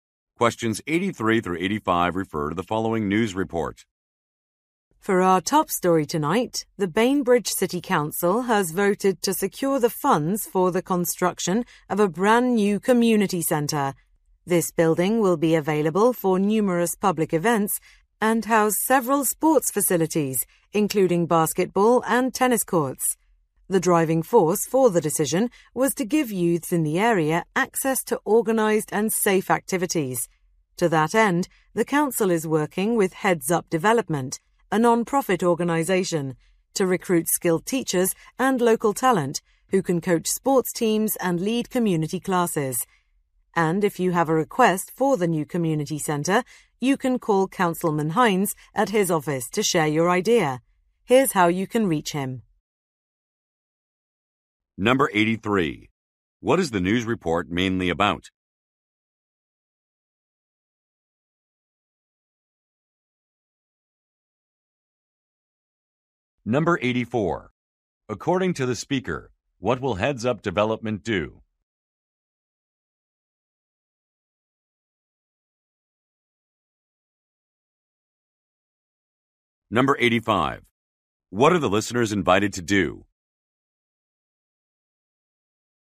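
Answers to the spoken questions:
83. Construction of a new community centre
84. Recruit teachers and coaches
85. Call Councilman Hines with their ideas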